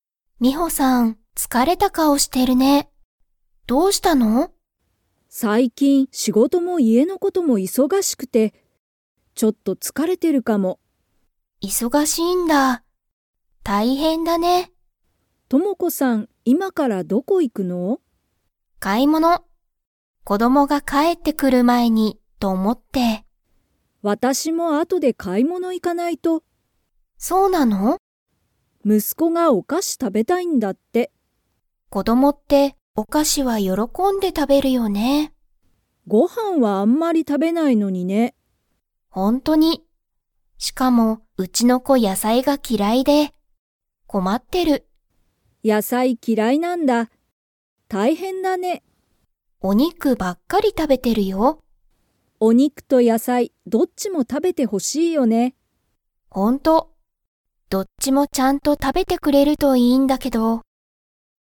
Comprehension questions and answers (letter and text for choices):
Comprehension Quiz (Skip if you don't understand the conversation yet)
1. ミホの息子むすこは、何なにが食たべたいですか?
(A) 買かい物もの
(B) 野菜やさい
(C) お菓子かし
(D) お肉にく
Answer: (C) お菓子かし

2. トモコの子こどもは、野菜やさいが だ。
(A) 好すき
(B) 嫌きらい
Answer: (B) 嫌きらい

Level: Level 4